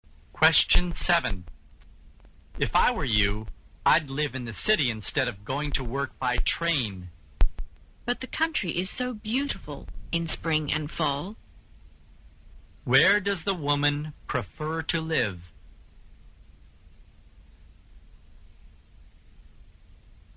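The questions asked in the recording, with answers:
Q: Where does the woman prefer to live?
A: In the country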